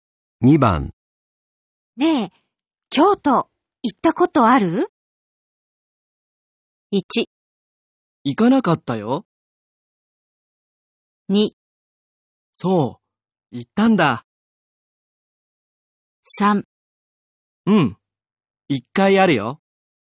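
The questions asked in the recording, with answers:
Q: ねえ、京都行ったことある?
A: 3: うん、一回あるよ。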